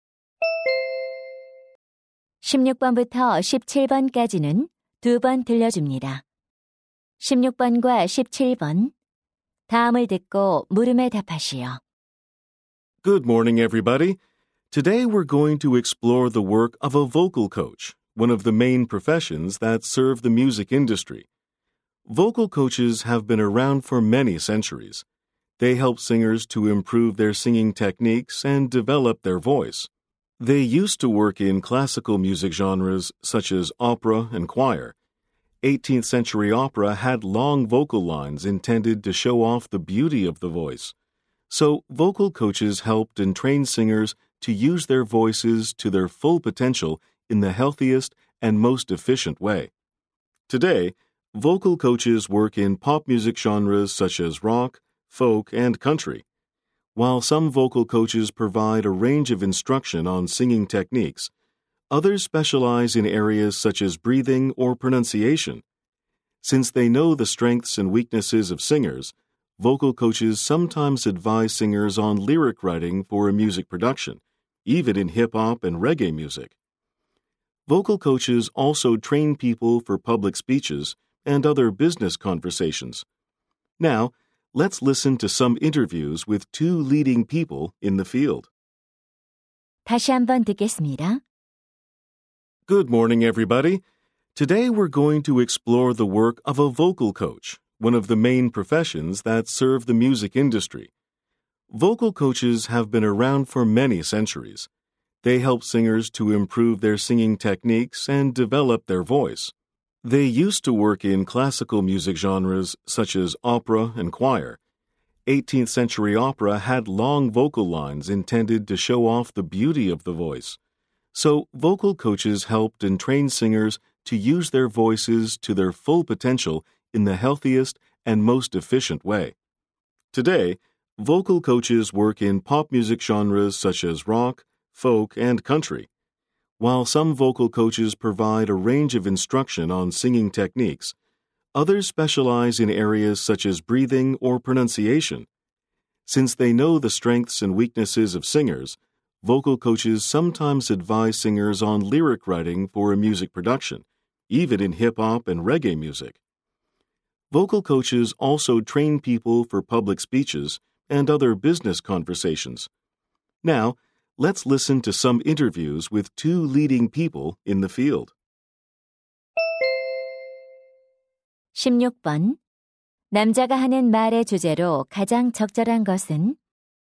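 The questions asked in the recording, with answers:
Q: 남자가 하는 말의 주제로 가장 적절한 것은?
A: 보컬 코치가 하는 일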